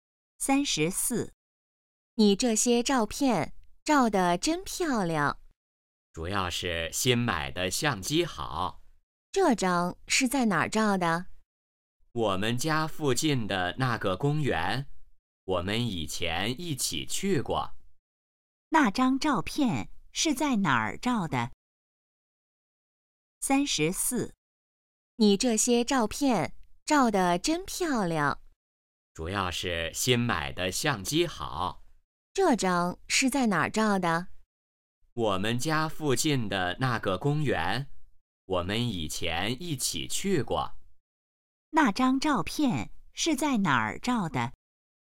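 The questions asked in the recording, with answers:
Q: 那张照片是在哪儿照的?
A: 家附近的公园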